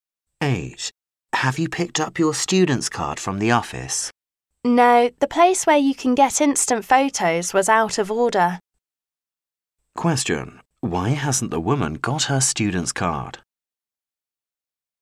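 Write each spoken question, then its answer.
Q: Why hasn't the woman got her student's card?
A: The instant photo machine was out of order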